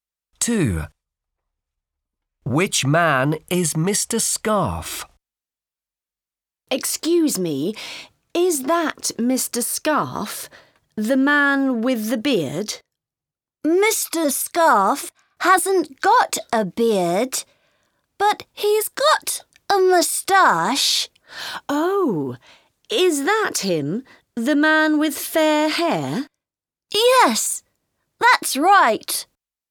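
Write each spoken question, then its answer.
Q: Which man is Mr. Scarf?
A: The man with fair hair and a moustache, no beard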